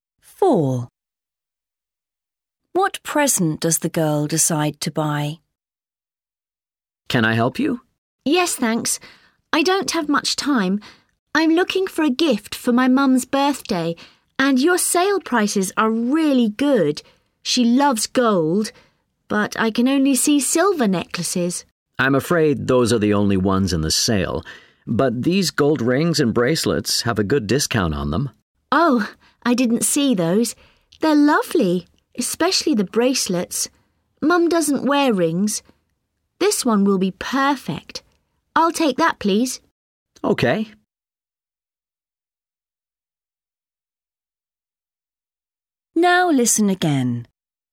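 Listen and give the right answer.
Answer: a gold bracelet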